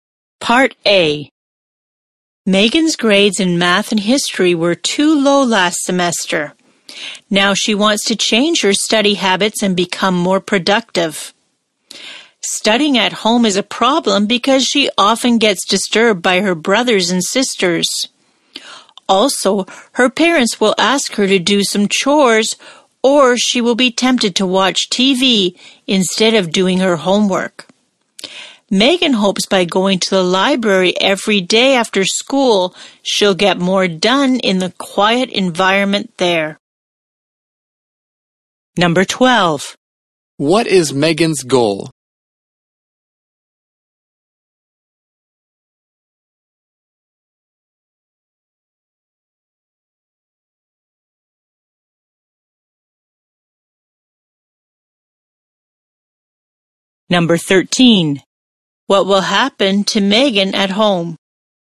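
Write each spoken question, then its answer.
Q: What is Megan's goal?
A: To change her study habits and become more productive

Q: What will happen to Megan at home?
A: She gets disturbed by her siblings, asked to do chores, or tempted to watch TV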